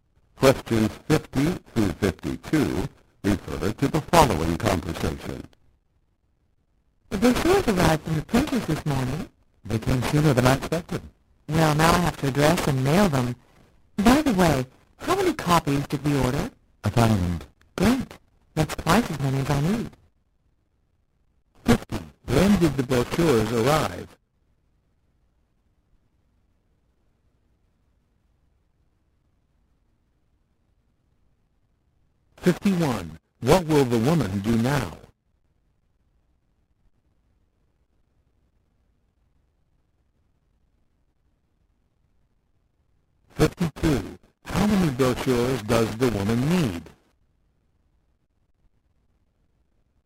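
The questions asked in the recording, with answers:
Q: When did the brochures arrive?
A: This morning

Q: What will the woman do now?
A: Address and mail the brochures

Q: How many brochures does the woman need?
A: 500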